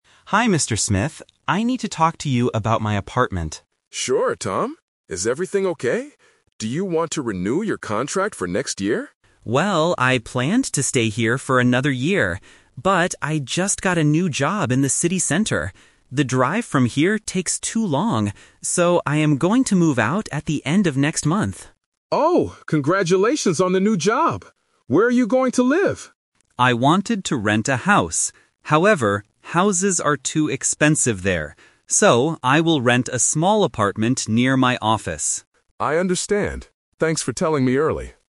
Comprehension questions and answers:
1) What is the tenant's plan for next month?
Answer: To move out of the apartment

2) Why is the tenant going to move?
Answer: His drive to work is too long.

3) Where will the tenant live next?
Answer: In a small apartment

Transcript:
Tenant: Hi, Mr. Smith. I need to talk to you about my apartment.
Landlord: Sure, Tom. Is everything okay? Do you want to renew your contract for next year?
Tenant: Well, I planned to stay here for another year. But, I just got a new job in the city center. The drive from here takes too long. So, I am going to move out at the end of next month.
Landlord: Oh, congratulations on the new job! Where are you going to live?
Tenant: I wanted to rent a house. However, houses are too expensive there. So, I will rent a small apartment near my office.